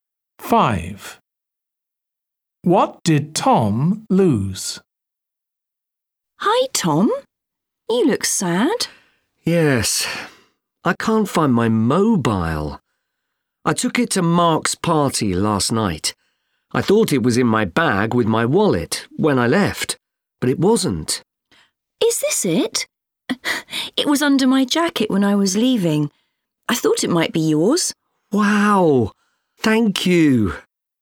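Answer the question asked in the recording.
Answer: his mobile phone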